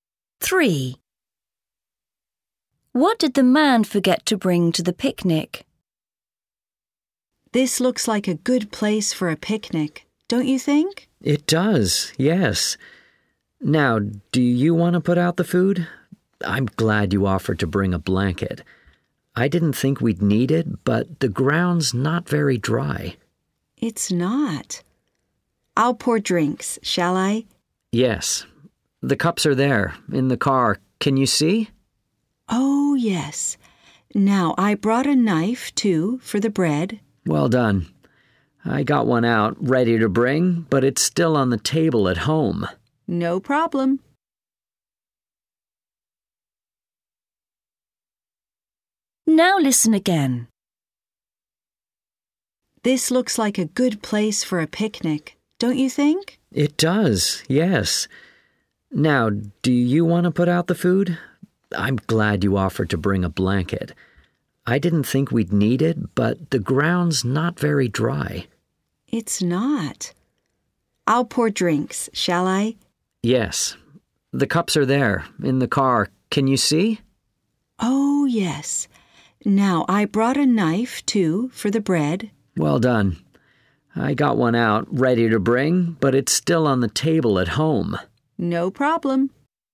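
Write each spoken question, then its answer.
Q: What did the man forget to bring to the picnic?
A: A knife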